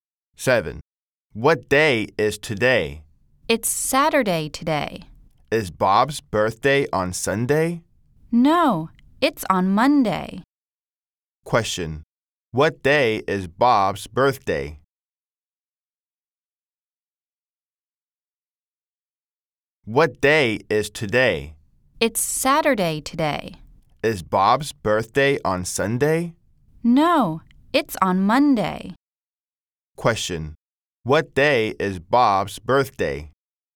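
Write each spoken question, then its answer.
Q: Question, what day is Bob's birthday?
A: Monday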